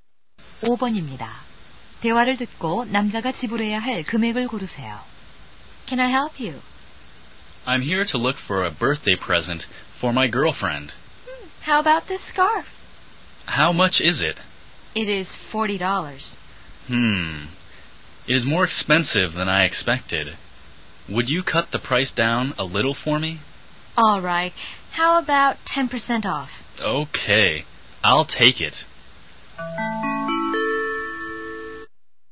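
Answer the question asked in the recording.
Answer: 36달러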